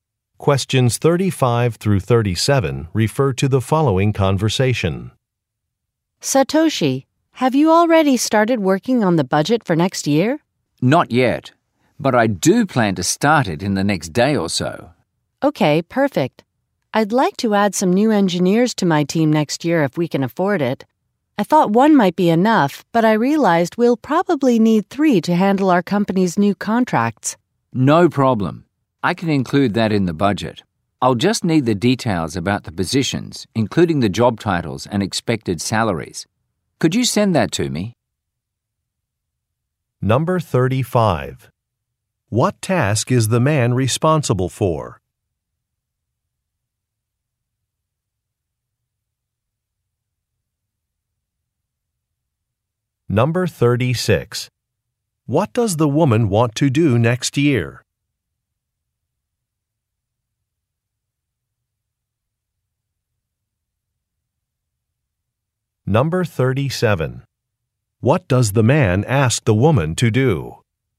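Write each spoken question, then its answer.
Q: What task is the man responsible for?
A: Preparing the budget

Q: What does the woman want to do next year?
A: Hire new engineers

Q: What does the man ask the woman to do?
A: Send details about the positions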